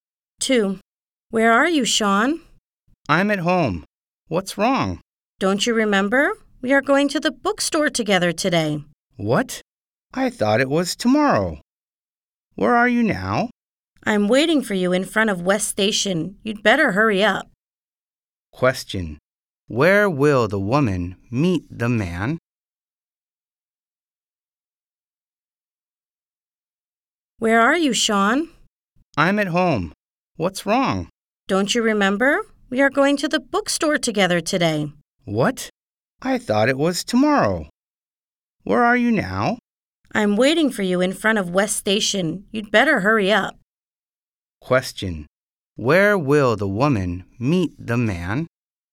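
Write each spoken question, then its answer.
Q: Where will the woman meet the man?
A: In front of West Station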